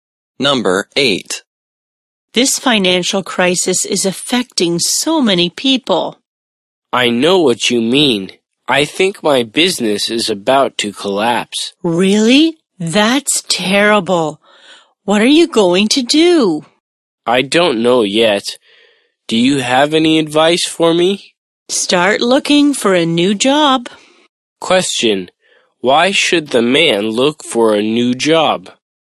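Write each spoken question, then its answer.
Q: Question. Why should the man look for a new job?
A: His business is about to collapse.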